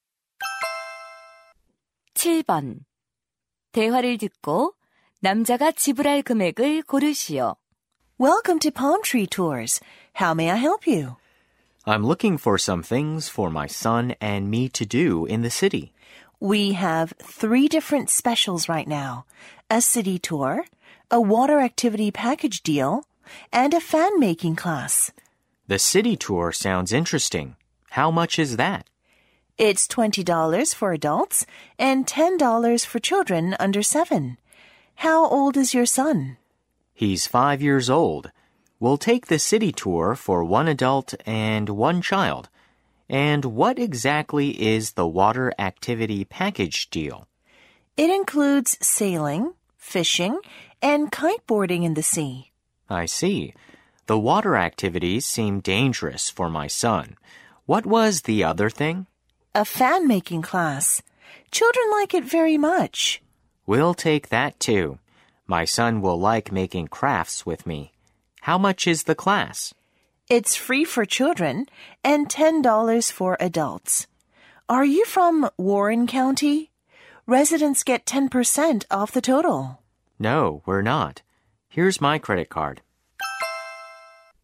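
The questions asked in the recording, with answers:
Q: 대화를 듣고 남자가 지불할 금액을 고르시오.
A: $40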